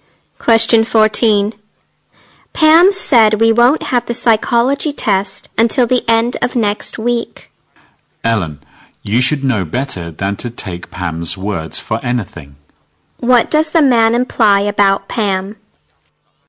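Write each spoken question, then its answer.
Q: What does the man imply about Pam?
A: Pam is not reliable; her words can't be trusted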